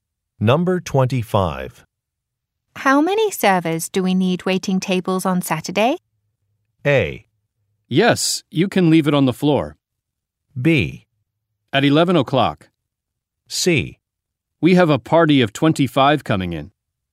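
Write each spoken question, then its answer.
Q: How many servers do we need waiting tables on Saturday?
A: C: We have a party of 25 coming in.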